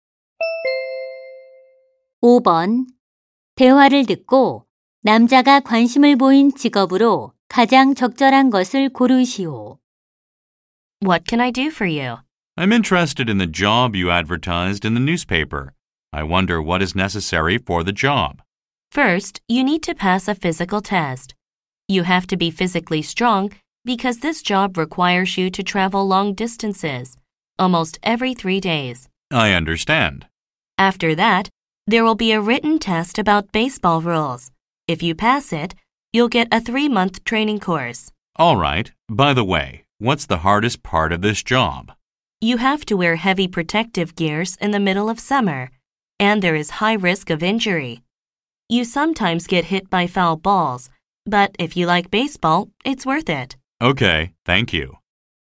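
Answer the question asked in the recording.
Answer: 야구 심판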